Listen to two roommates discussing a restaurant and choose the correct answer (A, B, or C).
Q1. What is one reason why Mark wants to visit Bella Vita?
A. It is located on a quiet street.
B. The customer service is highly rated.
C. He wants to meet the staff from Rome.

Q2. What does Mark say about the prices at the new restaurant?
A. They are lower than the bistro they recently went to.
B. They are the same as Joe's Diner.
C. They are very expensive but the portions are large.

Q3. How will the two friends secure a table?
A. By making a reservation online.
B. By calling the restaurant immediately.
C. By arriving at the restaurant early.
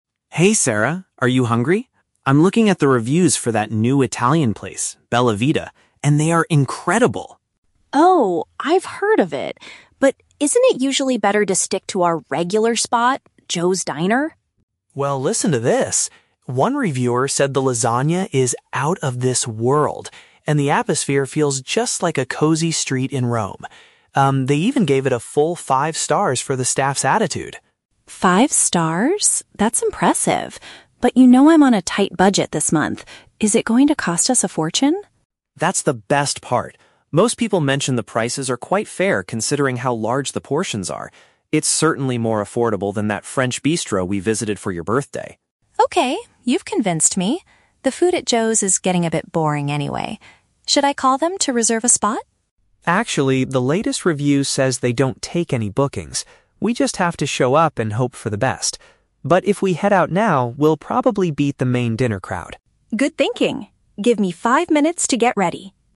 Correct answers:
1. The customer service is highly rated.
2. They are lower than the bistro they recently went to.
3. By arriving at the restaurant early.

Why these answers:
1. Mark mentions that the restaurant got "five stars for the staff's attitude." In B1 level, "staff's attitude" is a paraphrase for "customer service." The Trap: Option (A) is a trap because Mark mentions a "street in Rome," but that was to describe the atmosphere, not the actual location. Option (C) mentions Rome, but the staff aren't necessarily from there.
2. Mark says it is "more affordable than that French bistro we visited." "More affordable" means "lower prices/cheaper." The Trap: Option (B) is mentioned (Joe's Diner), but Mark says Joe's is "boring" and doesn't compare the prices. Option (C) uses the word "expensive," which Mark denies by saying the prices are "fair."
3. Mark explicitly states "they don't take any bookings" (meaning no reservations) and suggests they "head out now" to "beat the dinner crowd" (arrive early). The Trap: Option (A) and (B) are traps because Sarah suggests calling to book, but Mark corrects her, saying it's not possible.

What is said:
Mark: Hey Sarah, are you hungry? I'm looking at the reviews for that new Italian place, Bella Vita, and they are incredible!
Sarah: Oh, I've heard of it. But isn't it usually better to stick to our regular spot, Joe's Diner?
Mark: Well, listen to this! One reviewer said the lasagna is "out of this world" and the atmosphere feels just like a cozy street in Rome. Um, they even gave it a full five stars for the staff's attitude.
That's impressive. But you know I'm on a tight budget this month. Is it going to cost us a fortune?
Mark: That's the best part! Most people mentioned the prices are quite fair considering how large the portions are. It's certainly more affordable than that French bistro we visited for your birthday.
Sarah: Okay, you've convinced me. The food at Joe's is getting a bit boring anyway. Should I call them to reserve a spot?
Mark: Actually, the latest review says they don't take any bookings. We just have to show up and hope for the best. But if we head out now, we'll probably beat the main dinner crowd.

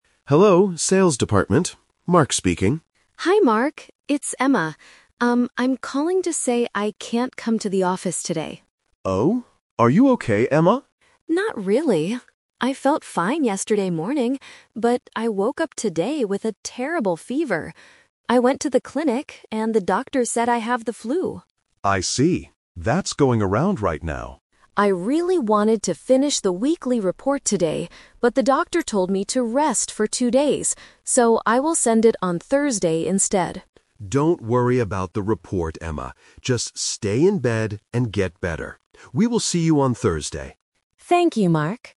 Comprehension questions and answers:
Listen to a phone conversation between an employee and her manager. Choose the correct answer (A, B, or C) for each question.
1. Why is Emma calling her manager?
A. To tell him she is going to be late for work.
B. To tell him she is sick and cannot come to the office.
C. To ask him for help with a weekly report.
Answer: To tell him she is sick and cannot come to the office.

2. What did Emma originally want to do today?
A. Go to the health clinic.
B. Sleep all day in bed.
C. Finish the weekly report.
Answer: Finish the weekly report.

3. How long did the doctor tell Emma to rest?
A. Just for today.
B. For two days.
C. Until next Monday.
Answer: For two days.

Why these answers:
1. Emma says at the beginning, "I'm calling to say I can't come to the office today." She then explains she has a fever and the flu. The Trap: Option C is a trap. The script mentions the "weekly report," but she is not asking for help with it; she is explaining why it will be late. Option A is incorrect because she is not coming in at all, not just being late.
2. Emma says, "I really wanted to finish the weekly report today..." This was her original plan. The Trap: Option A is the A2 "Twist" trap. She did go to the clinic, but she went because she was sick, not because she originally wanted to. Option B is a trap because the manager tells her to "stay in bed," but that was not her original plan for the workday.
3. Emma clearly states, "the doctor told me to rest for two days." The Trap: Option A is a trap. Emma is calling to say she can't come to the office "today," but her doctor told her to rest for two days, so she will be back on Thursday. Option C is a plausible guess in real life, but it is not mentioned in the audio.

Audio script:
Manager: Hello, Sales Department. Mark speaking.
Emma: Hi, Mark. It's Emma. Um, I'm calling to say I can't come to the office today.
Manager: Oh? Are you okay, Emma?
Emma: Not really. I felt fine yesterday morning, but I woke up today with a terrible fever. I went to the clinic, and the doctor said I have the flu.
Manager: I see. That's going around right now.
Emma: I really wanted to finish the weekly report today, but the doctor told me to rest for two days. So, I will send it on Thursday instead.
Manager: Don't worry about the report, Emma. Just stay in bed and get better. We will see you on Thursday.

